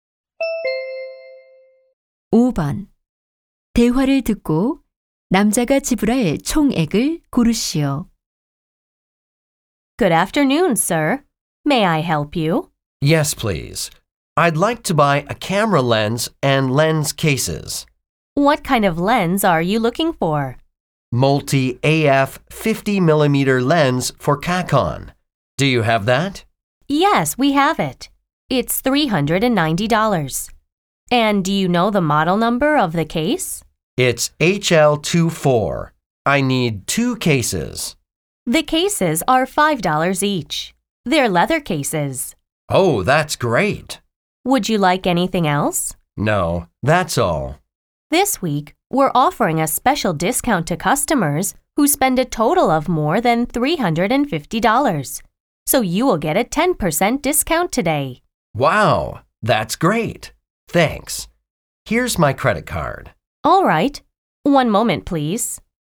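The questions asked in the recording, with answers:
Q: 대화를 듣고 남자가 지불할 총액을 고르시오.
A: 360달러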